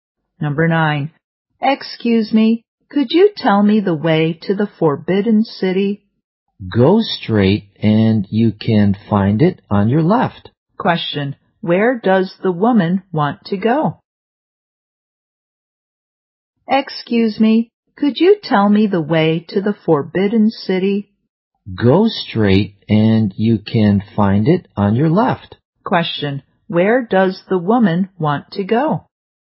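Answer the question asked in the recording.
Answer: The Forbidden City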